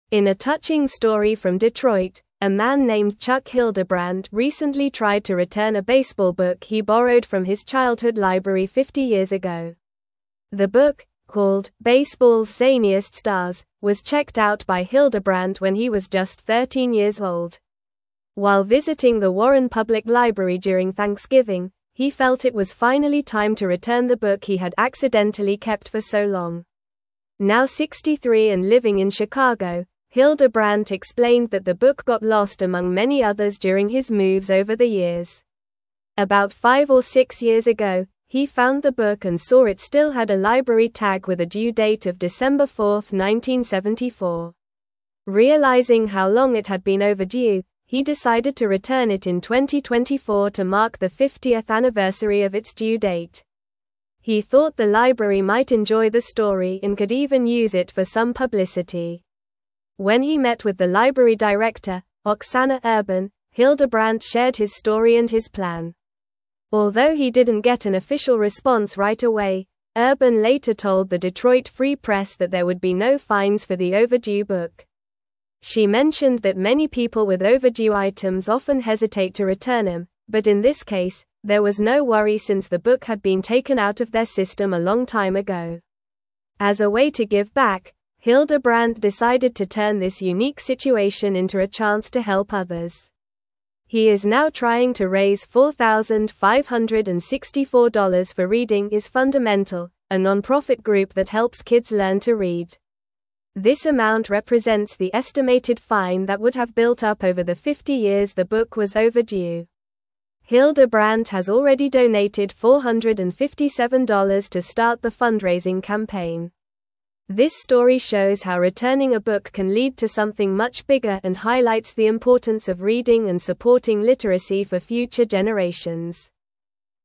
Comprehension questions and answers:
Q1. In a touching story from Detroit, a man named Chuck Hildebrandt recently tried to return a baseball book he (1)______ from his childhood library fifty years ago.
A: borrowed

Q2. The book, called "Baseball's (2)______ Stars," was checked out by Hildebrandt when he was just 13 years old.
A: Zaniest

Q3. While visiting the (3)______ Public Library during Thanksgiving, he felt it was finally time to return the book he had accidentally kept for so long.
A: Warren

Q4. Now 63 and living in (4)______, Hildebrandt explained that the book got lost among many others during his moves over the (5)______.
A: Chicago

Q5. Now 63 and living in (4)______, Hildebrandt explained that the book got lost among many others during his moves over the (5)______.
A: years

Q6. About five or six years ago, he found the book and saw it still had a library tag with a due date of (6)______ 4, 1974.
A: December

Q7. Realizing how long it had been overdue, he decided to return it in 2024 to mark the 50th (7)______ of its due date.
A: anniversary

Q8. When he met with the library director, (8)______ Urban, Hildebrandt shared his story and his plan.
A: Oksana

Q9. She mentioned that many people with overdue (9)______ often (10)______ to return them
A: items

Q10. She mentioned that many people with overdue (9)______ often (10)______ to return them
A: hesitate

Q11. As a way to give back, Hildebrandt (11)______ to turn this (12)______ situation into a chance to help others.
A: decided

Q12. As a way to give back, Hildebrandt (11)______ to turn this (12)______ situation into a chance to help others.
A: unique

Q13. He is now trying to raise $4,564 for Reading is Fundamental, a nonprofit group that (13)______ kids learn to read.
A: helps

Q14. This amount (14)______ the estimated fine that would have built up over the fifty years the book was overdue.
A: represents

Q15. Hildebrandt has already donated $457 to start the fundraising (15)______.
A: campaign

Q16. This story shows how (16)______ a book can lead to something much bigger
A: returning

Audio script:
In a touching story from Detroit, a man named Chuck Hildebrandt recently tried to return a baseball book he borrowed from his childhood library fifty years ago. The book, called "Baseball's Zaniest Stars," was checked out by Hildebrandt when he was just 13 years old. While visiting the Warren Public Library during Thanksgiving, he felt it was finally time to return the book he had accidentally kept for so long.
Now 63 and living in Chicago, Hildebrandt explained that the book got lost among many others during his moves over the years. About five or six years ago, he found the book and saw it still had a library tag with a due date of December 4, 1974. Realizing how long it had been overdue, he decided to return it in 2024 to mark the 50th anniversary of its due date. He thought the library might enjoy the story and could even use it for some publicity.
When he met with the library director, Oksana Urban, Hildebrandt shared his story and his plan. Although he didn't get an official response right away, Urban later told the Detroit Free Press that there would be no fines for the overdue book. She mentioned that many people with overdue items often hesitate to return them, but in this case, there was no worry since the book had been taken out of their system a long time ago.
As a way to give back, Hildebrandt decided to turn this unique situation into a chance to help others. He is now trying to raise $4,564 for Reading is Fundamental, a nonprofit group that helps kids learn to read. This amount represents the estimated fine that would have built up over the fifty years the book was overdue. Hildebrandt has already donated $457 to start the fundraising campaign. This story shows how returning a book can lead to something much bigger and highlights the importance of reading and supporting literacy for future generations.

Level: Level 3